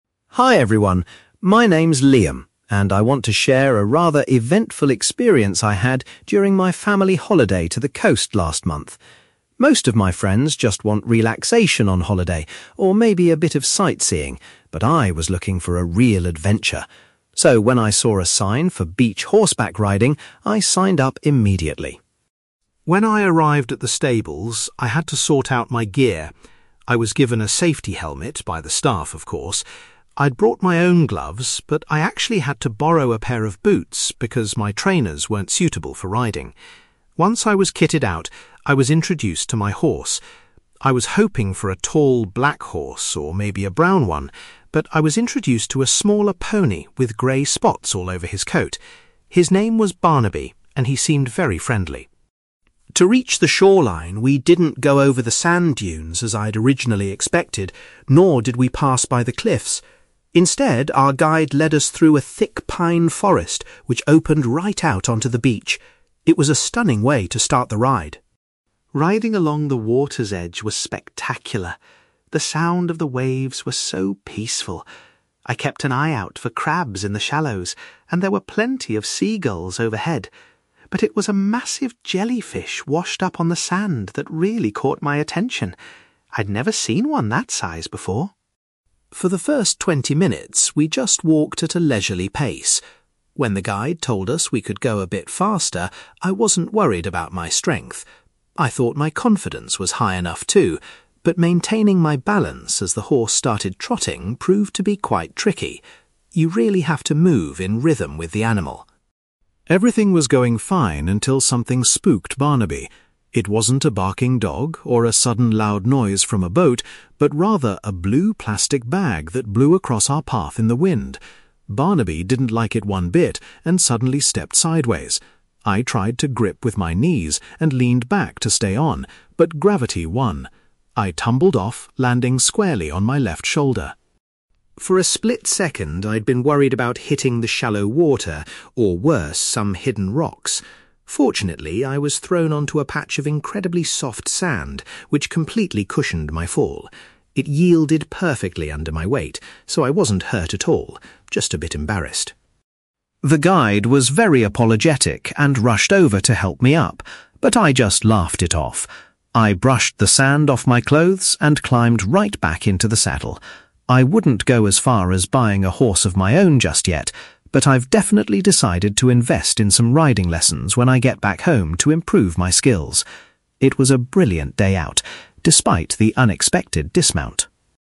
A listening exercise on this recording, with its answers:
You will hear a young man called Liam talking about a horseback riding excursion on a beach. For questions 9-18, complete the sentences with a word or short phrase.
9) Liam says he was looking for an (9)........................... rather than a relaxing holiday.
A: adventure

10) Before setting off, Liam needed to borrow some (10)........................... because his own footwear wasn't suitable.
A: boots

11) Liam's horse, Barnaby, was easy to recognise because of the (11)........................... on his body.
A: grey spots

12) The group had to travel through a (12)........................... before they reached the shoreline.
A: pine forest

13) While riding near the water, Liam spotted a large (13)........................... that had washed ashore.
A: jellyfish

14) Liam struggled with his (14)........................... once the horse began to move faster.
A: balance

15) The horse was suddenly startled by a (15)........................... moving in the wind.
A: plastic bag

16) During the fall, Liam hit the ground with his (16)........................... first.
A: left shoulder

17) Liam escaped injury because he landed on an area of (17)........................... .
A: soft sand

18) After the experience, Liam wants to spend money on (18)........................... back home.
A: riding lessons

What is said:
Liam: Hi everyone. My name's Liam, and I want to share a rather eventful experience I had during my family holiday to the coast last month. Most of my friends just want relaxation on holiday, or maybe a bit of sightseeing, but I was looking for a real adventure. So, when I saw a sign for beach horseback riding, I signed up immediately.
When I arrived at the stables, I had to sort out my gear. I was given a safety helmet by the staff, of course. I'd brought my own gloves, but I actually had to borrow a pair of boots because my trainers weren't suitable for riding. Once I was kitted out, I was introduced to my horse. I was hoping for a tall black horse, or maybe a brown one, but I was introduced to a smaller pony with grey spots all over his coat. His name was Barnaby, and he seemed very friendly.
To reach the shoreline, we didn't go over the sand dunes as I'd originally expected, nor did we pass by the cliffs. Instead, our guide led us through a thick pine forest which opened right out onto the beach. It was a stunning way to start the ride.
Riding along the water's edge was spectacular. The sound of the waves was so peaceful. I kept an eye out for crabs in the shallows, and there were plenty of seagulls overhead, but it was a massive jellyfish washed up on the sand that really caught my attention. I'd never seen one that size before!
For the first twenty minutes, we just walked at a leisurely pace. When the guide told us we could go a bit faster, I wasn't worried about my strength. I thought my confidence was high enough too, but maintaining my balance as the horse started trotting proved to be quite tricky. You really have to move in rhythm with the animal.
Everything was going fine until something spooked Barnaby. It wasn't a barking dog or a sudden loud noise from a boat, but rather a blue plastic bag that blew across our path in the wind. Barnaby didn't like it one bit and suddenly stepped sideways. I tried to grip with my knees, and leaned back to stay on, but gravity won. I tumbled off, landing squarely on my left shoulder.
For a split second, I'd been worried about hitting the shallow water or, worse, some hidden rocks. Fortunately, I was thrown onto a patch of incredibly soft sand, which completely cushioned my fall. It yielded perfectly under my weight, so I wasn't hurt at all, just a bit embarrassed!
The guide was very apologetic and rushed over to help me up, but I just laughed it off. I brushed the sand off my clothes and climbed right back into the saddle. I wouldn't go as far as buying a horse of my own just yet, but I've definitely decided to invest in some riding lessons when I get back home to improve my skills. It was a brilliant day out, despite the unexpected dismount!

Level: B2